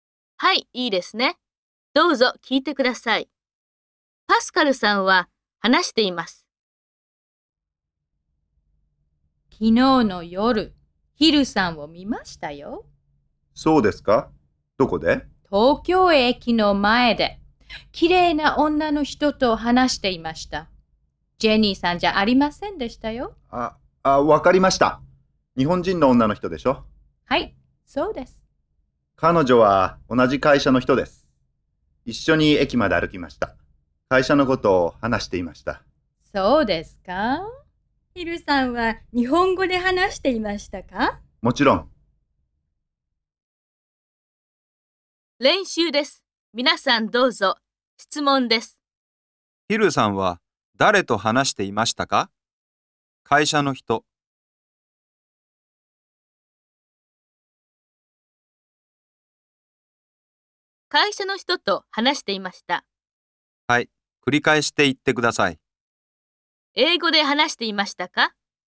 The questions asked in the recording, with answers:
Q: 英語で話していましたか?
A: いいえ、英語で話していませんでした。日本語で話していました。